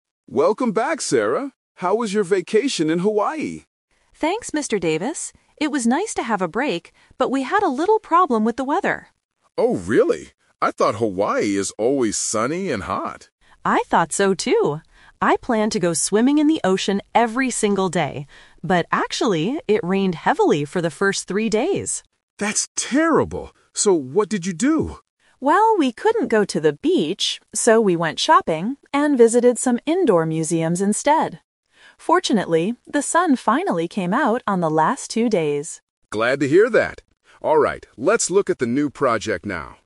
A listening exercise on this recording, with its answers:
Listen to a conversation between a manager and an employee on her first day back at work. Choose the correct answer (A, B, or C) for each question.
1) What was the weather like at the beginning of the vacation?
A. It was very sunny.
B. It rained a lot.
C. It was cold and snowy.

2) What did the employee actually do for the first few days?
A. She went swimming in the ocean.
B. She went shopping and visited museums.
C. She stayed in her hotel room.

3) How many days of sunshine did the employee have?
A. Two days.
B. Three days.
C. Five days.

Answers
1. B
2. B
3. A

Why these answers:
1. The employee clearly states, "it rained heavily for the first three days." Option A is the trap: the manager "thought" it was sunny, and the employee "planned" for sunny weather, but it wasn't. Option C is a plausible bad weather condition but is never mentioned.
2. Because of the rain, she says, "we went shopping and visited some indoor museums instead." Option A is the trap: she "planned to go swimming", but she couldn't. Option C is plausible for rainy days but is not mentioned in the audio.
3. The employee says, "the sun finally came out on the last two days." Option B is the trap: "three days" is the amount of time it rained, not the time it was sunny. Option C is not mentioned.

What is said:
Manager: Welcome back, Sarah! How was your vacation in Hawaii?
Employee: Thanks, Mr. Davis! It was nice to have a break, but we had a little problem with the weather.
Manager: Oh really? I thought Hawaii is always sunny and hot.
Employee: I thought so, too! I planned to go swimming in the ocean every single day. But actually, it rained heavily for the first three days.
Manager: That's terrible! So what did you do?
Employee: Well, we couldn't go to the beach, so we went shopping and visited some indoor museums instead. Fortunately, the sun finally came out on the last two days.

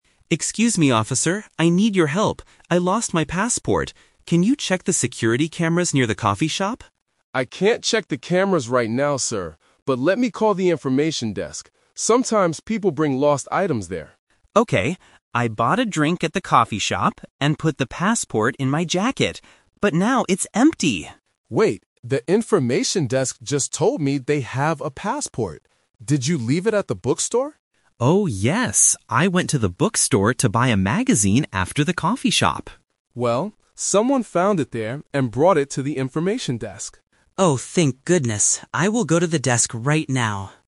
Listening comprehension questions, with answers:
Listen to the conversation between a passenger and a security guard. Choose the correct answer (A, B, or C).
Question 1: What did the passenger want the guard to do FIRST?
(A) Call the information desk.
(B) Check the security cameras.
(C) Search his jacket.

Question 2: What did the passenger buy at the bookstore?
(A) A drink.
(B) A jacket.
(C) A magazine.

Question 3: Where is the passenger's passport NOW?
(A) At the information desk.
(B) At the coffee shop.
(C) At the bookstore.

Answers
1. B
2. C
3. A

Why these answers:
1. At the beginning, the passenger asks, "Can you check the security cameras near the coffee shop?" Option (A) is The Trap because calling the information desk was the guard's idea, not the passenger's request. Option (C) is where he put his passport.
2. The passenger remembers his actions and says: "I went to the bookstore to buy a magazine." Option (A) is The Trap because he bought a drink at the coffee shop. Option (B) is a plausible clothing item but is not what he bought.
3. This question uses "The Twist". The passenger thought he lost it at the "coffee shop" (Option B - The Trap). He actually left it at the "bookstore" (Option C - The Trap). However, the guard says someone found it and "brought it to the information desk." So, the passport is at the desk right now.

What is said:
Passenger: Excuse me, officer! I need your help. I lost my passport. Can you check the security cameras near the coffee shop?
Security Guard: I can't check the cameras right now, sir. But let me call the information desk. Sometimes people bring lost items there.
Passenger: Okay. I bought a drink at the coffee shop and put the passport in my jacket. But now it's empty!
Security Guard: Wait, the information desk just told me they have a passport. Did you leave it at the bookstore?
Passenger: Oh, yes! I went to the bookstore to buy a magazine after the coffee shop.
Security Guard: Well, someone found it there and brought it to the information desk.

